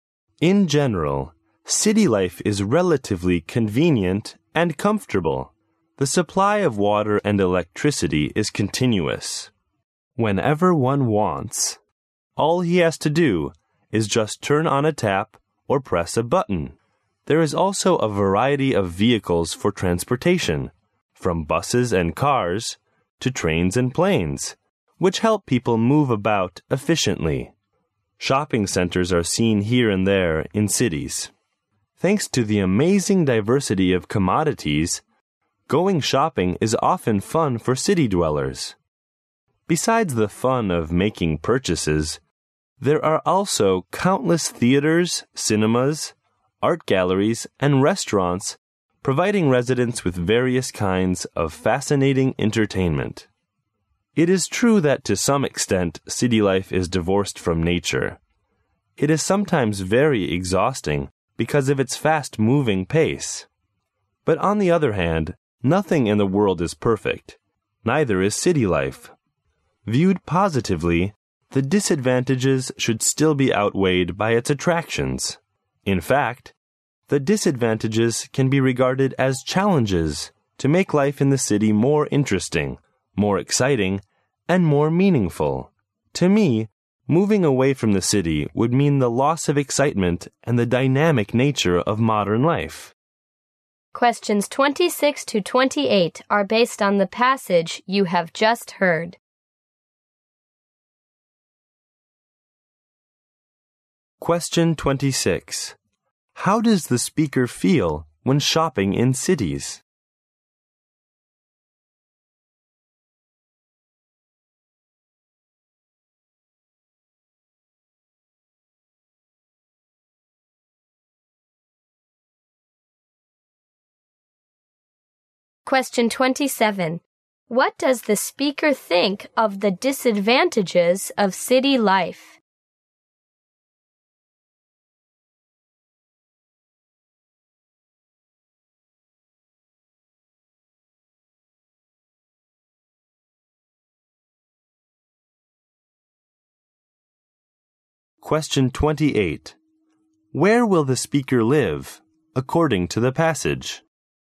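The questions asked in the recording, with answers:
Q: How does the speaker feel when shopping in cities?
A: It is fun

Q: What does the speaker think of the disadvantages of city life?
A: They are outweighed by its attractions and can be seen as challenges

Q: Where will the speaker live, according to the passage?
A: In the city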